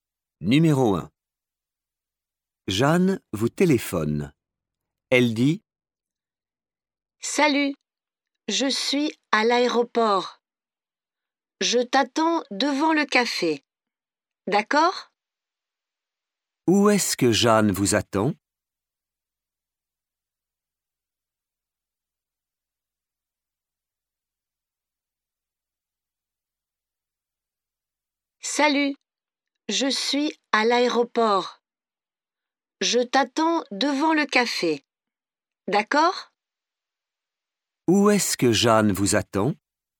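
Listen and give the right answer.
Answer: devant le café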